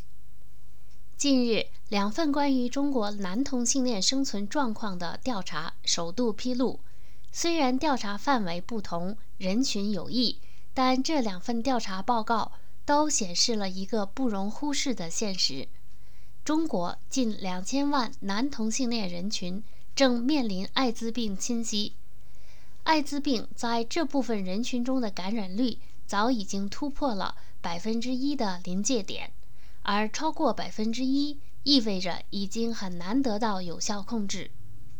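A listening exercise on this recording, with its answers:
Please answer the following questions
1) 艾滋病感染率超过1%意味着什么?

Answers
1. 意味着已经很难得到有效控制

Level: 3rd Year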